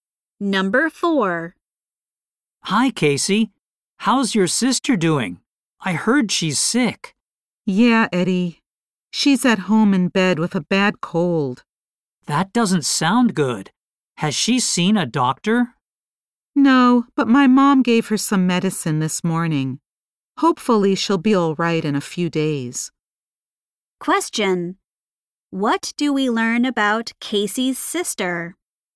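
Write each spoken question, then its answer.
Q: What do we learn about Casey's sister?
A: She is in bed with a bad cold.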